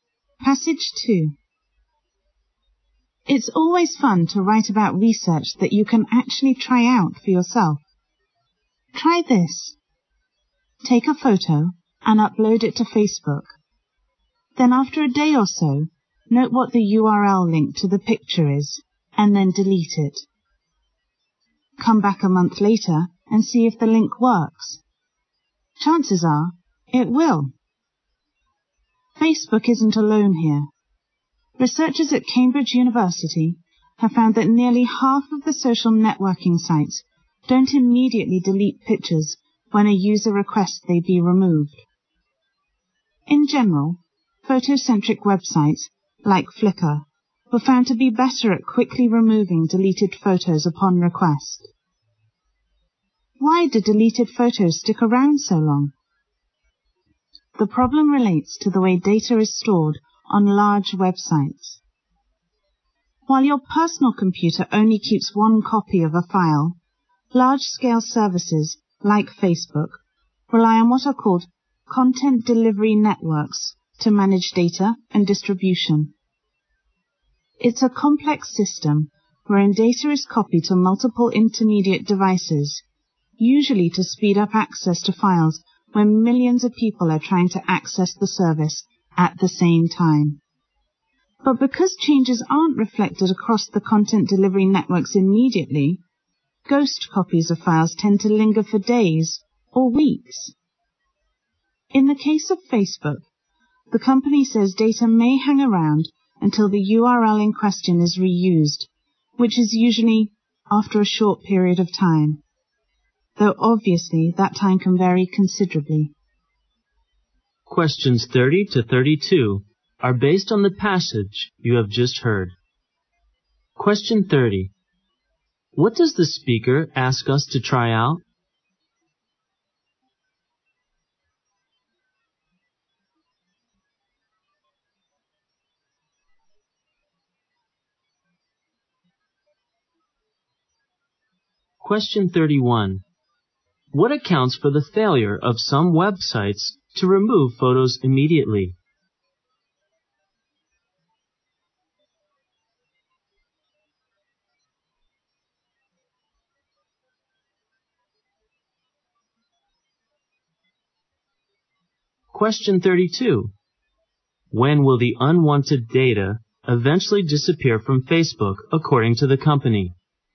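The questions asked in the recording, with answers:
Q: What does the speaker ask us to try out?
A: Upload a photo to Facebook, delete it, and see if its link still works a month later.

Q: What accounts for the failure of some websites to remove photos immediately?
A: The way large websites store data across content delivery networks.

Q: When will the unwanted data eventually disappear from Facebook, according to the company?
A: When the URL is reused.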